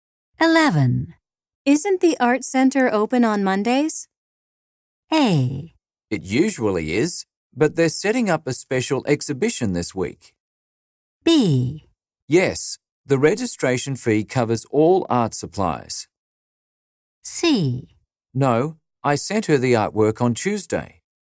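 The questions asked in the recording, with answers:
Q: Isn't the art center open on Mondays?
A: A: It usually is, but they're setting up a special exhibition this week.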